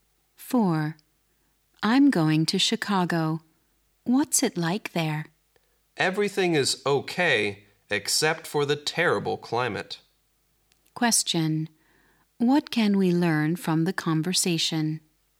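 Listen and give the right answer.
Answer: The climate in Chicago is terrible.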